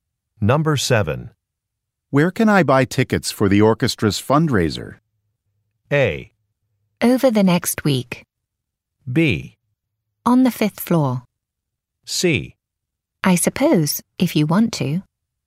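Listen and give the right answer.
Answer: B: On the fifth floor.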